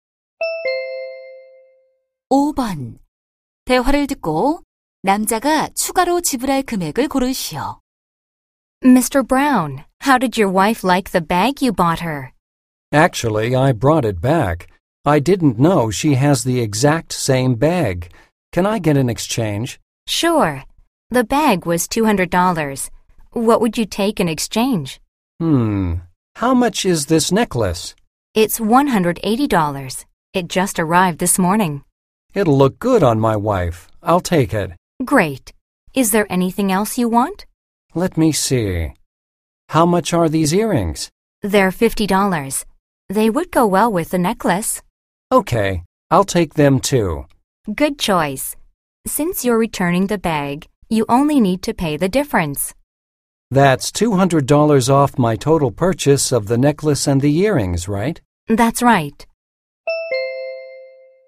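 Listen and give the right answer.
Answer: 30달러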